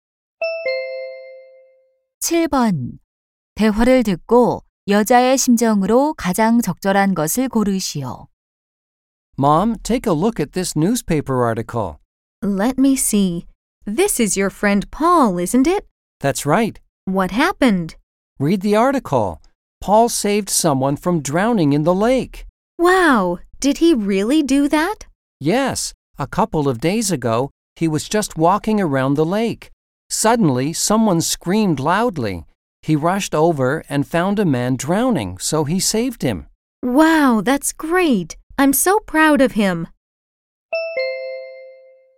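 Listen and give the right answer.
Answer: 자랑스러움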